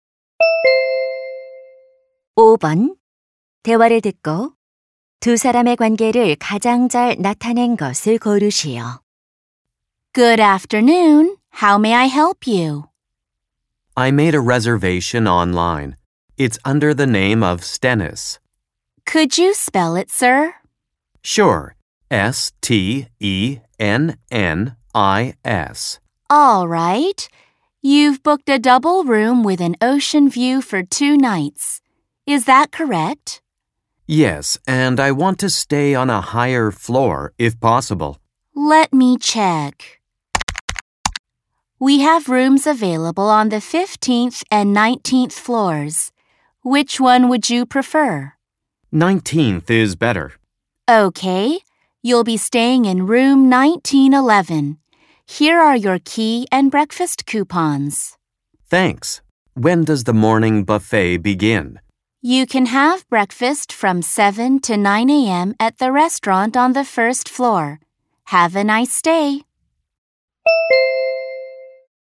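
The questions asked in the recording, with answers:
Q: 대화를 듣고 두 사람의 관계를 가장 잘 나타낸 것을 고르시오.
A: 호텔 직원 - 투숙객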